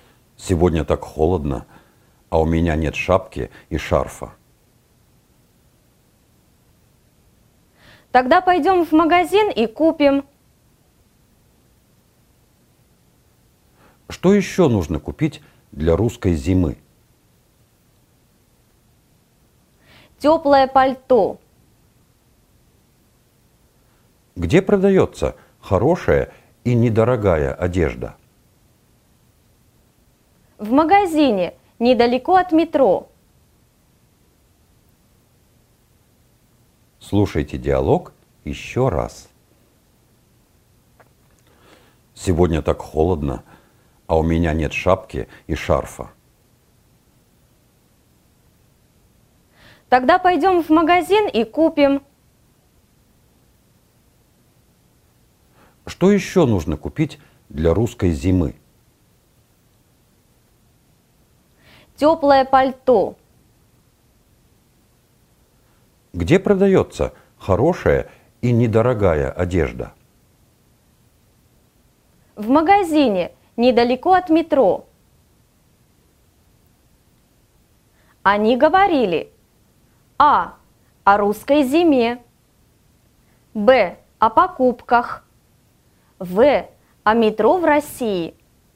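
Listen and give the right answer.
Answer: Б: о покупках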